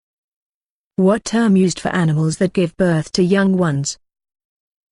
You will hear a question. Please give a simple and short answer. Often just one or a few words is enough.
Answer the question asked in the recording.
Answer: Mammals